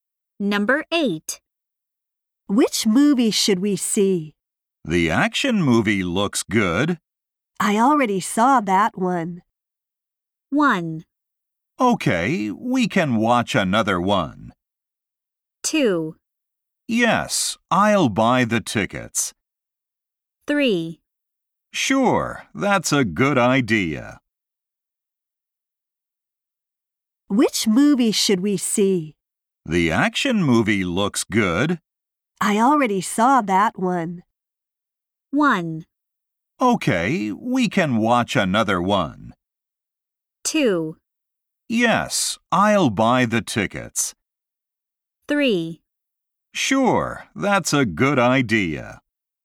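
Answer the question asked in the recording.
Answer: 1: Okay, we can watch another one.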